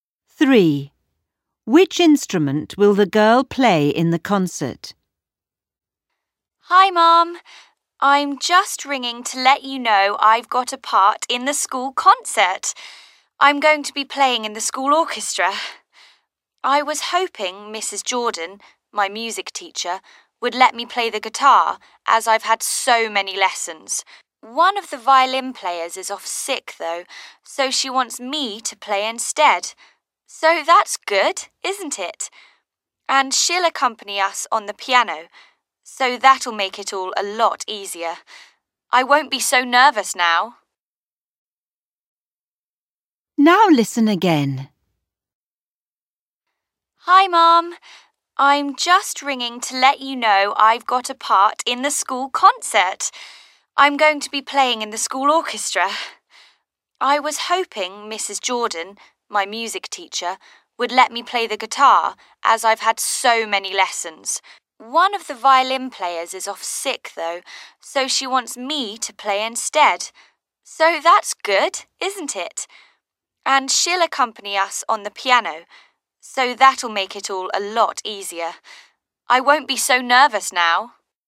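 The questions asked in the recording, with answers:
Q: Which instrument will the girl play in the concert?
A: The violin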